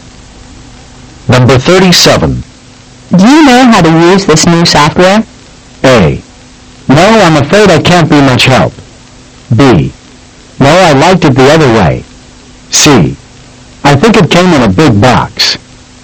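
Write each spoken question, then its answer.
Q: Do you know how to use this new software?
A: A: No, I'm afraid I can't be much help.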